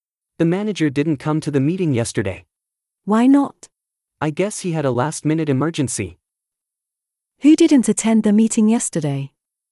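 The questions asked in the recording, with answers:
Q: Who didn't attend the meeting yesterday?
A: The manager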